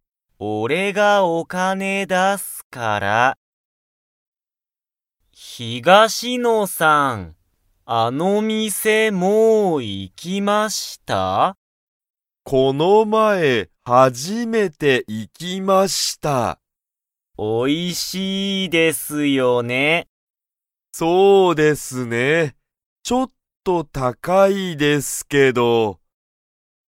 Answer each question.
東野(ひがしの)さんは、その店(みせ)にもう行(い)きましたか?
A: はい

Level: Level 1